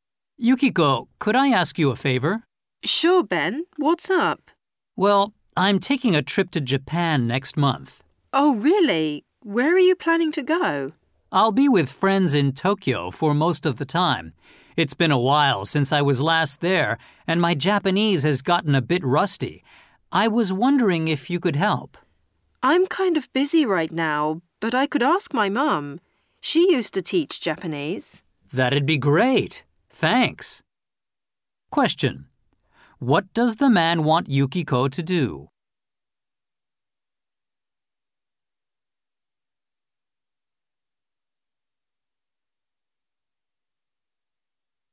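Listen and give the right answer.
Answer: Help him with his Japanese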